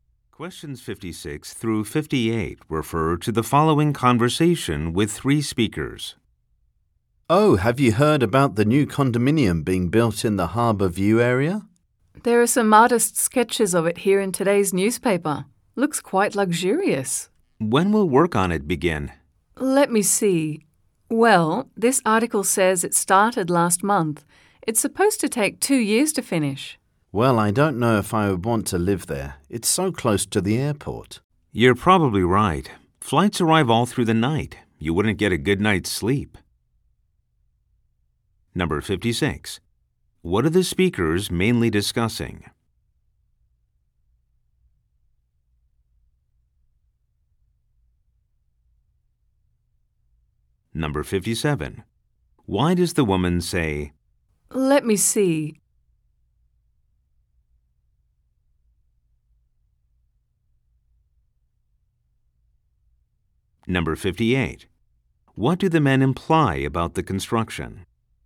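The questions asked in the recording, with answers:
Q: What are the speakers mainly discussing?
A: A new condominium being built

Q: Why does the woman say,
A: She is checking the article for when construction begins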